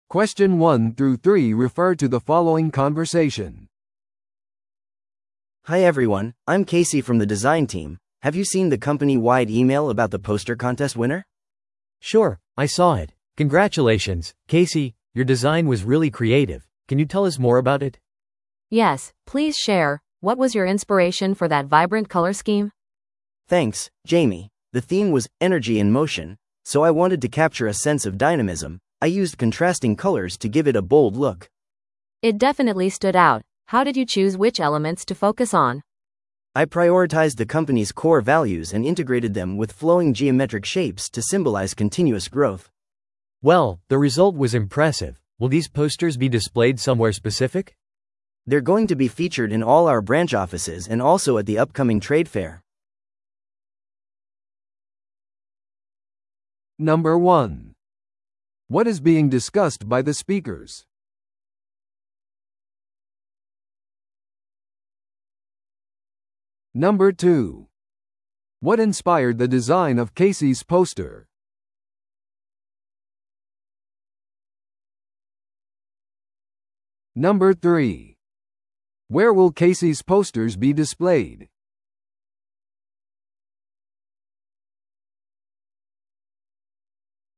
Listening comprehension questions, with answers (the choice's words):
Listen to the audio below and answer the questions.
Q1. What is being discussed by the speakers?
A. デザインチームの新プロジェクト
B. 会社内のポスターコンテスト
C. 今後開催されるトレードフェアイベント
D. 会社の最近のリブランディング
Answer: 会社内のポスターコンテスト

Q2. What inspired the design of Casey's poster?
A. デザインチームのイノベーション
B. 動きとエネルギーのダイナミズム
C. オフィスの幾何学的建築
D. 特定の現代美術作品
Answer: 動きとエネルギーのダイナミズム

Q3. Where will Casey's posters be displayed?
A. 地元のアートギャラリー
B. 都市の公共スペース全体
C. 会社のウェブサイト上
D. すべての支店とトレードフェアで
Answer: すべての支店とトレードフェアで

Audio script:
A: Hi everyone, I'm Casey from the design team. Have you seen the company-wide email about the poster contest winner?
B: Sure, I saw it. Congratulations, Casey! Your design was really creative. Can you tell us more about it?
C: Yes, please share! What was your inspiration for that vibrant color scheme?
A: Thanks, Jamie. The theme was 'Energy in Motion', so I wanted to capture a sense of dynamism. I used contrasting colors to give it a bold look.
C: It definitely stood out. How did you choose which elements to focus on?
A: I prioritized the company's core values and integrated them with flowing geometric shapes to symbolize continuous growth.
B: Well, the result was impressive. Will these posters be displayed somewhere specific?
A: They're going to be featured in all our branch offices and also at the upcoming trade fair.